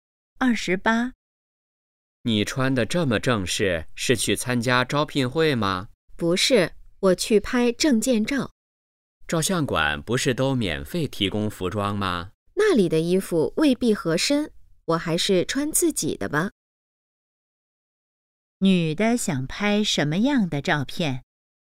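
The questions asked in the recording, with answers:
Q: 女的想拍什么样的照片?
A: 证件照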